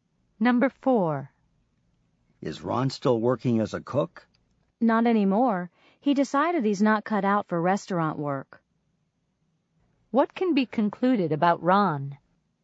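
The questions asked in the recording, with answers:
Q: What can be concluded about Ron?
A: He quit because he isn't suited to restaurant work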